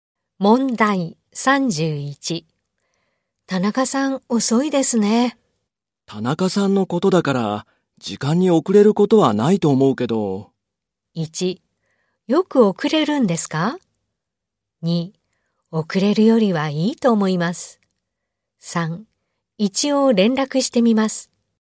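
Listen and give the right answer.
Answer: 3: 一応連絡してみます。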